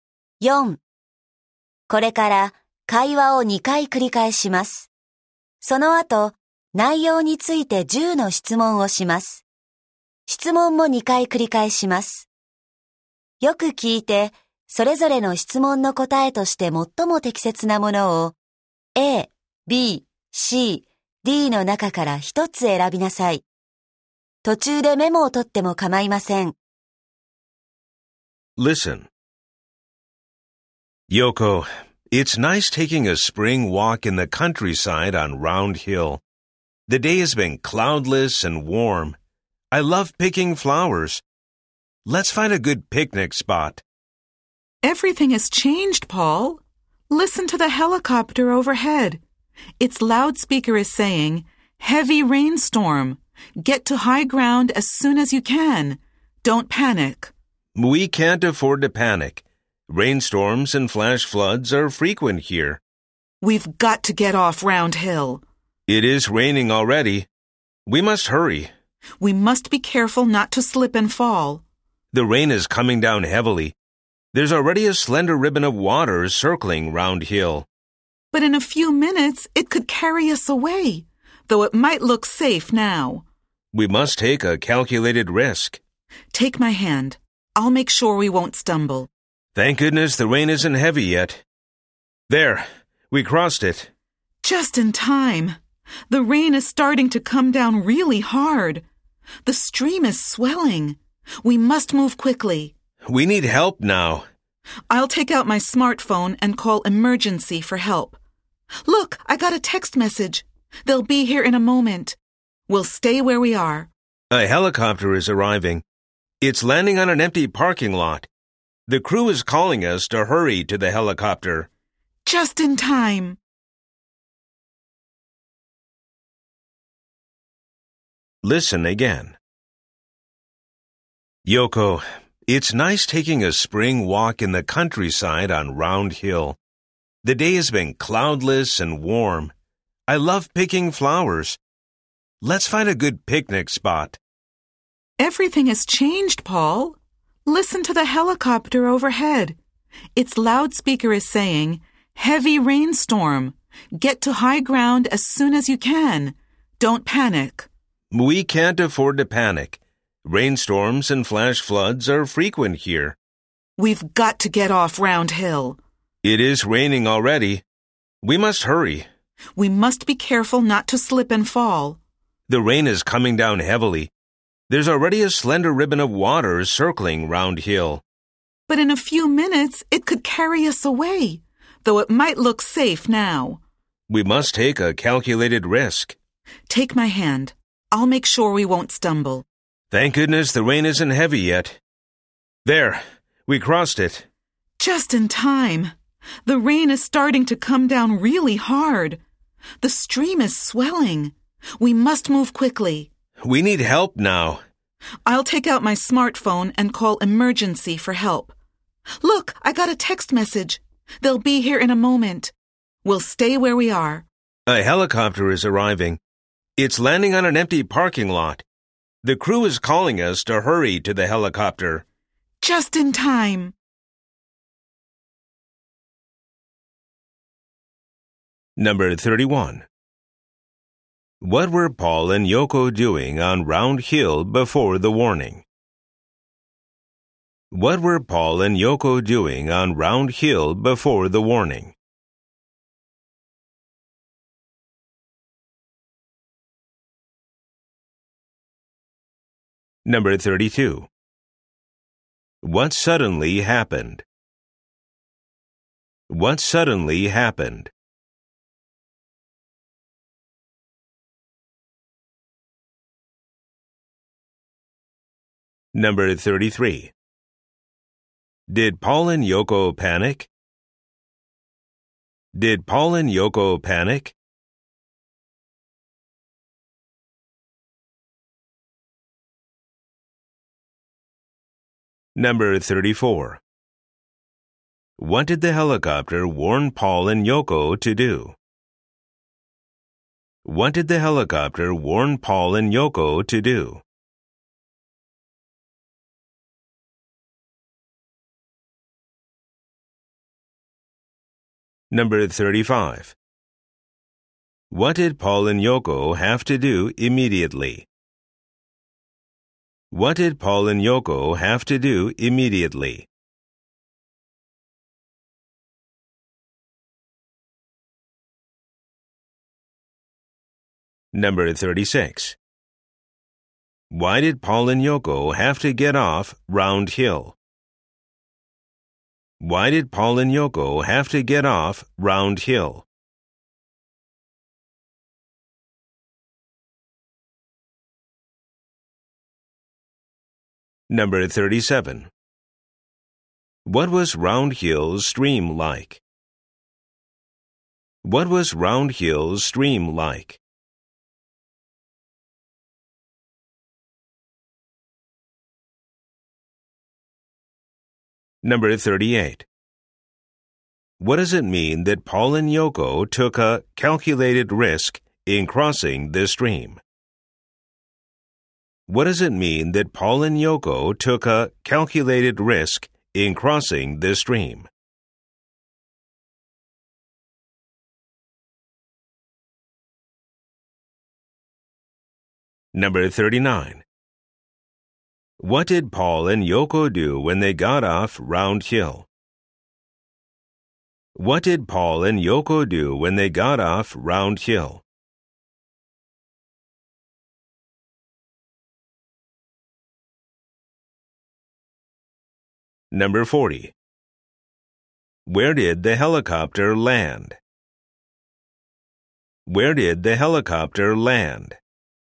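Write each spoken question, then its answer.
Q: What were Paul and Yoko doing on Round Hill before the warning?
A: Taking a spring walk, picking flowers and looking for a picnic spot

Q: What suddenly happened?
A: A heavy rainstorm came

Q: Did Paul and Yoko panic?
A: No

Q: What did the helicopter warn Paul and Yoko to do?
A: Get to high ground as soon as possible

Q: What did Paul and Yoko have to do immediately?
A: Get off Round Hill

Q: Why did Paul and Yoko have to get off Round Hill?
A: Rainstorms and flash floods are frequent there

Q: What was Round Hill's stream like?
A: A slender ribbon of water circling the hill that could swell and carry them away

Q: What did Paul and Yoko do when they got off Round Hill?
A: Called emergency for help on a smartphone and waited

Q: Where did the helicopter land?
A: On an empty parking lot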